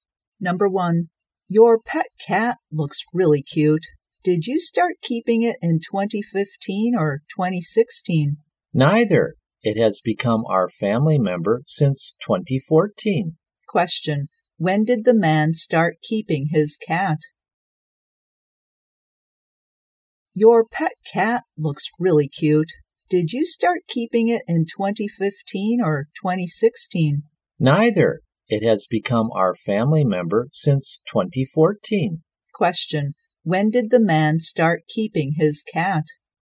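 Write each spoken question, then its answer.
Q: When did the man start keeping his cat?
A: In 2014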